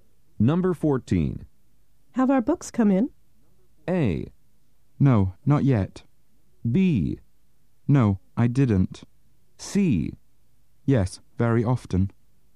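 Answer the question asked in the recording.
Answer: A: No, not yet.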